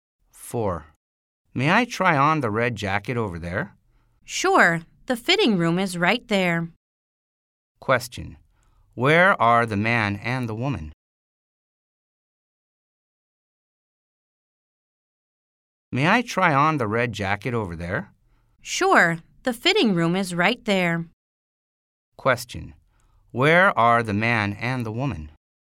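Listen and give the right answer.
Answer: In a clothing store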